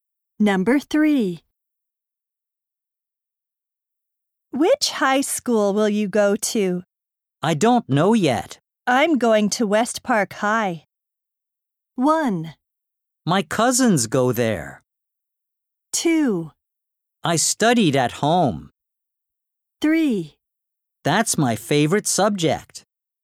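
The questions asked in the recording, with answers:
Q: I'm going to West Park High.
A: 1: My cousins go there.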